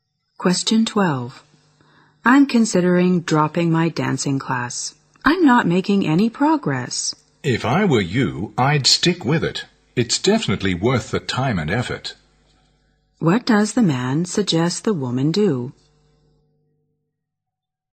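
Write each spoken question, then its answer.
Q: What does the man suggest the woman do?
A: Continue the dancing class.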